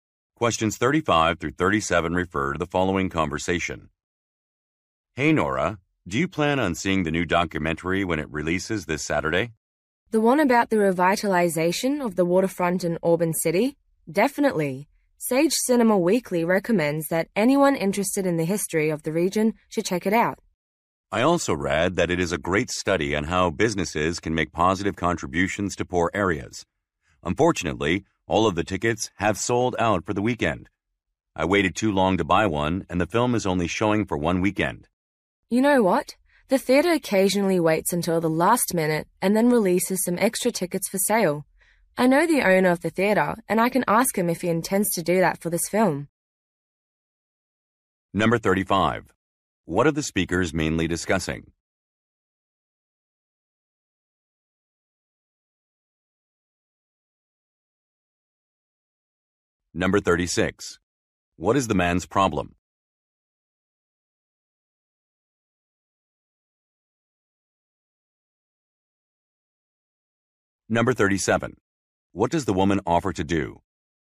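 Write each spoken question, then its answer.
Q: What are the speakers mainly discussing?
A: A new documentary film

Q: What is the man's problem?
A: The tickets are sold out

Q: What does the woman offer to do?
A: Ask the theater owner about releasing extra tickets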